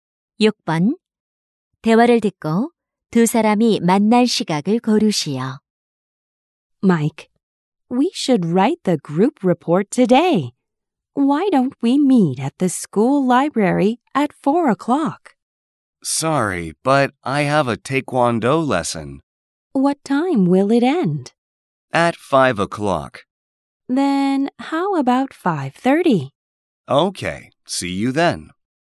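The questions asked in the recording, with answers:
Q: 대화를 듣고 두 사람이 만날 시각을 고르시오.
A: 5시 30분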